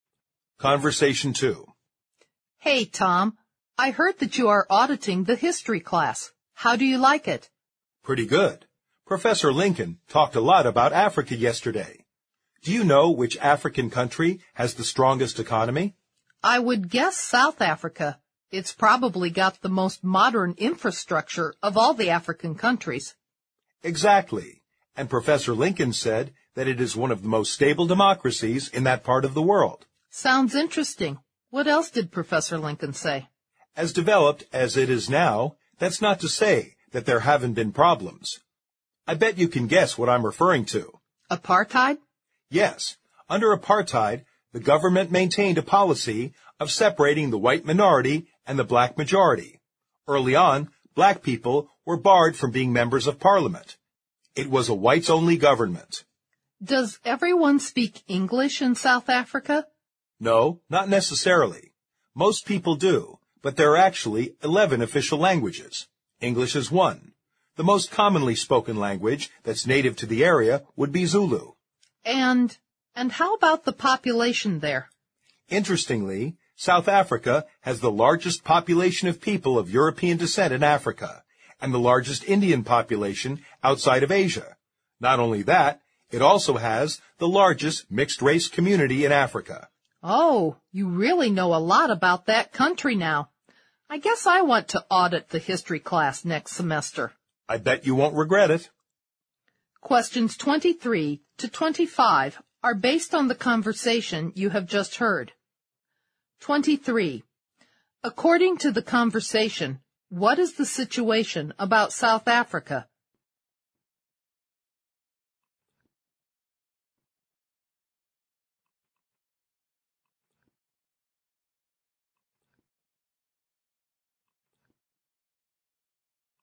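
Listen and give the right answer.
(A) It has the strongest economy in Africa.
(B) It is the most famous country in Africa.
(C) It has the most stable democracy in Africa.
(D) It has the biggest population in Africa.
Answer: (A) It has the strongest economy in Africa.

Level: 六级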